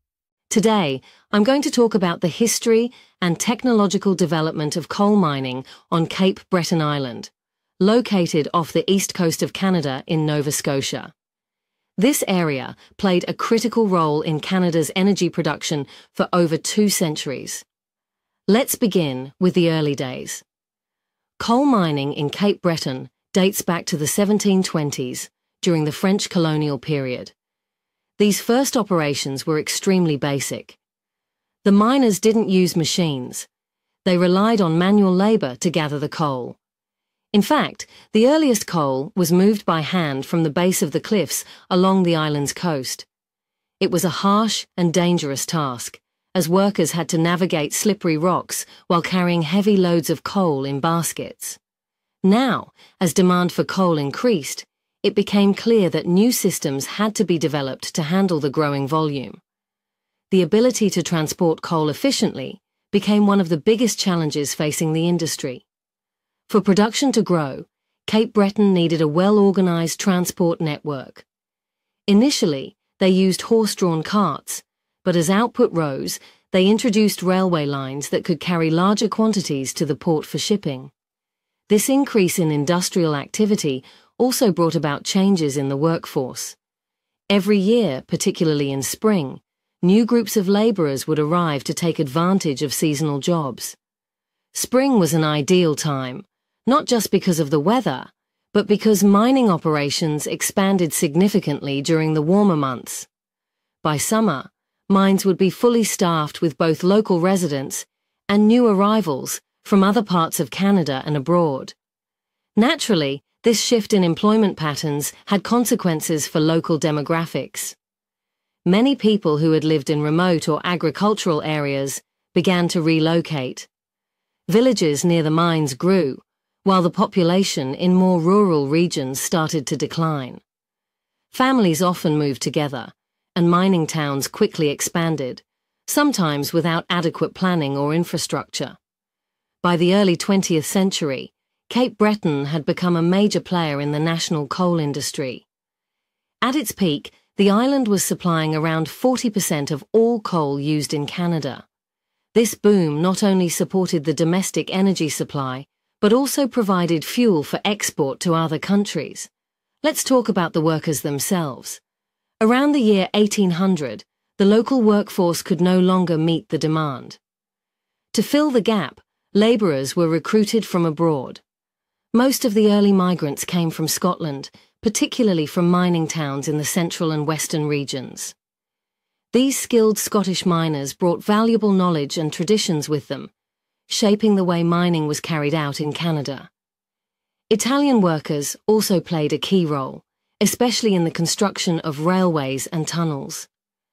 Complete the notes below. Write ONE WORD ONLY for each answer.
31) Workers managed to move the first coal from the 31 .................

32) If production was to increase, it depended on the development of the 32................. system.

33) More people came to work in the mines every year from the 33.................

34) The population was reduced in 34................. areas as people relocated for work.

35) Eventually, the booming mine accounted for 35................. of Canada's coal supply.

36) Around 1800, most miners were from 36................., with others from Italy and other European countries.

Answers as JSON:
{"31": "cliffs", "32": "transport", "33": "spring", "34": "rural", "35": "40%", "36": "Scotland"}